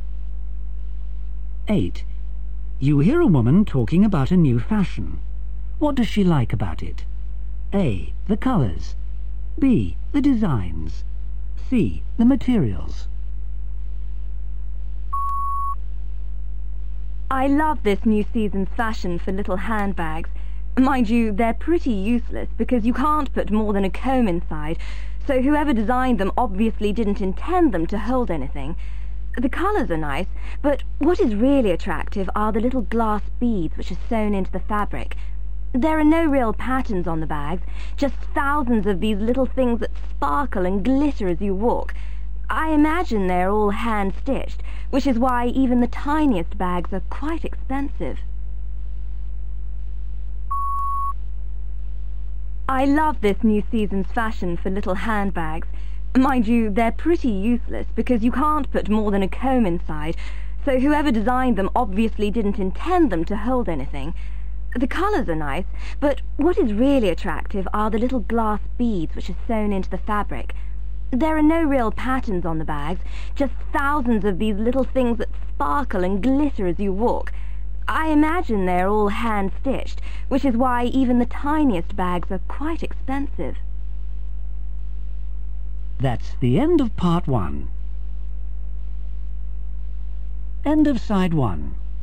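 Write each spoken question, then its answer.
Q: What does she like about it?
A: C: The materials.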